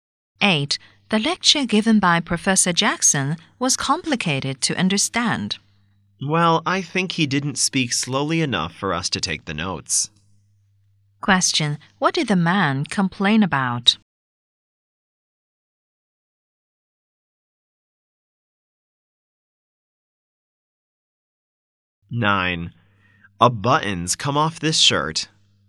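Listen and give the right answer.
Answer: The professor spoke too fast to take notes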